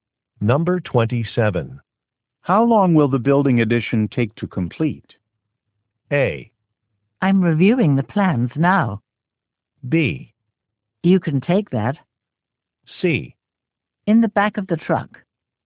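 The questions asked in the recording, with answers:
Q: How long will the building addition take to complete?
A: A: I'm reviewing the plans now.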